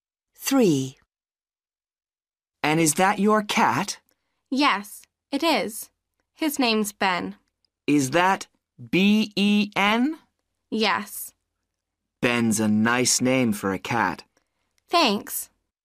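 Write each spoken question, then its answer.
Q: Is that B-E-N?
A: Yes, Ben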